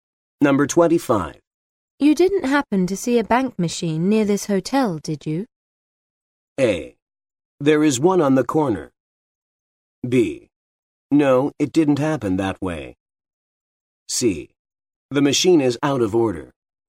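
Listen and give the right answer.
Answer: A: There is one on the corner.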